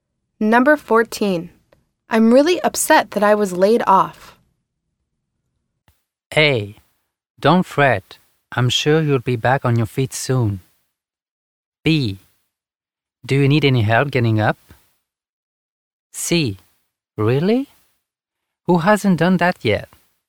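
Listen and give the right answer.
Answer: A: Don't fret. I'm sure you'll be back on your feet soon.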